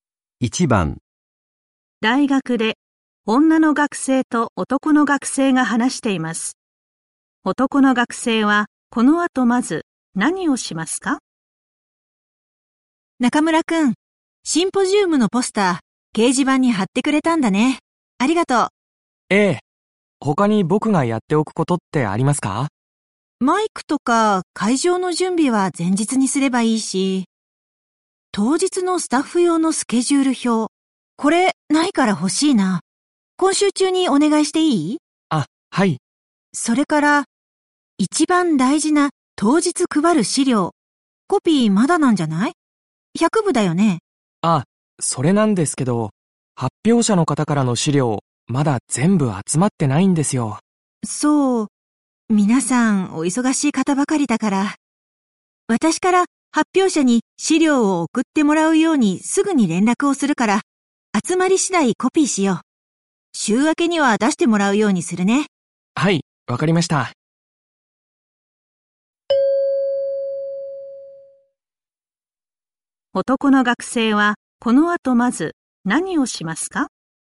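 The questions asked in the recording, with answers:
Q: 男の学生はこの後まず何をしますか?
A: 当日のスタッフ用のスケジュール表を作る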